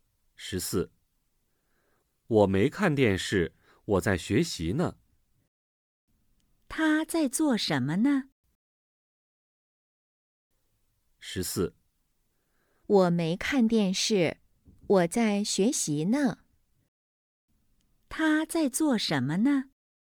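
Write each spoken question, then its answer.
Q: 他在做什么呢?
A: 在学习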